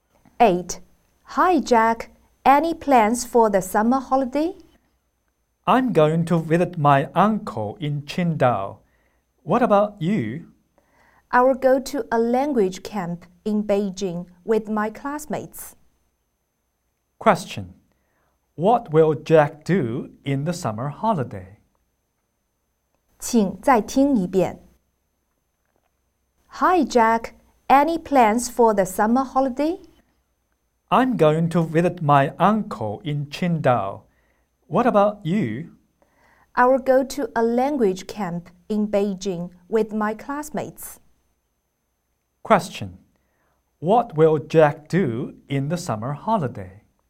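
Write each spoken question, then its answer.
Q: What will Jack do in the summer holiday?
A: Visit his uncle in Qingdao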